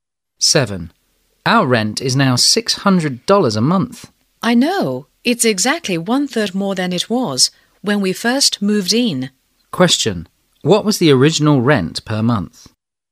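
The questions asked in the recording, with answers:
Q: What was the original rent per month?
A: $450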